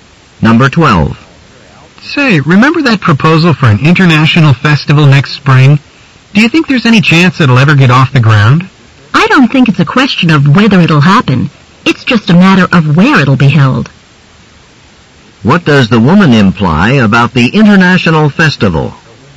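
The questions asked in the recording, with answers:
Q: What does the woman imply about the international festival?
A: It will take place; only the location is undecided.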